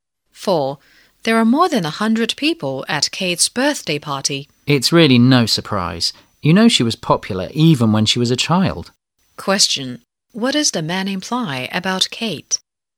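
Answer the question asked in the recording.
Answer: She has always been popular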